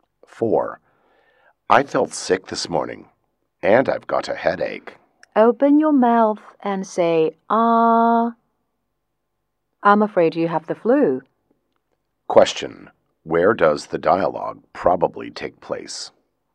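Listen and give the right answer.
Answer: In a hospital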